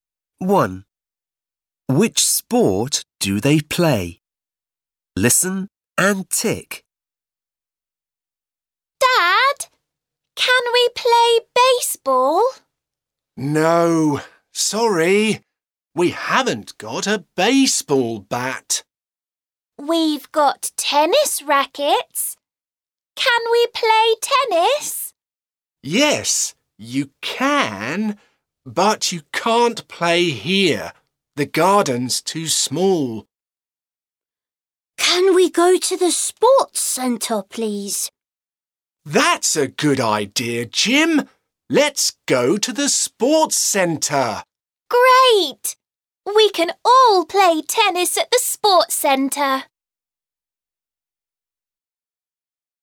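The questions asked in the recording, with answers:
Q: Which sport do they play?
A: tennis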